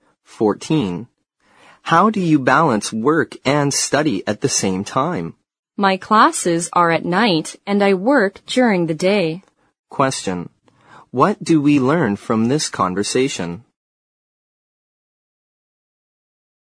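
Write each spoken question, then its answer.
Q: What do we learn from this conversation?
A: The speaker works during the day and takes classes at night.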